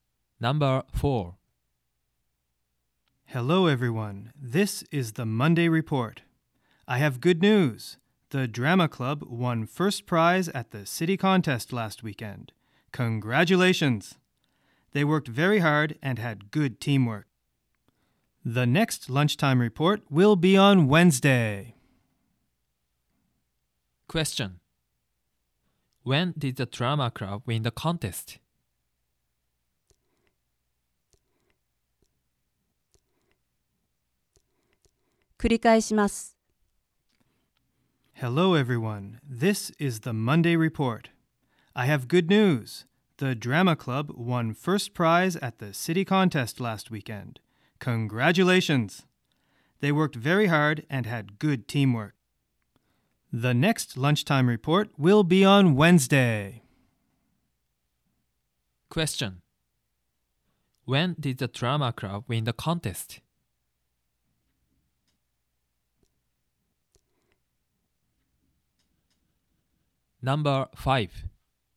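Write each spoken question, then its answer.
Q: When did the Drama Club win the contest?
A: Last weekend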